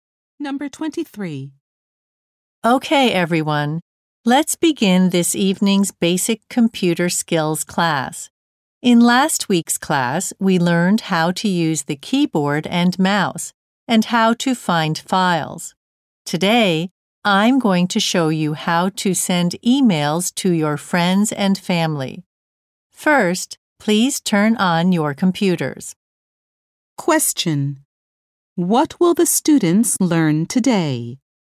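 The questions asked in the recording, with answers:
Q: What will the students learn today?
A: How to send emails.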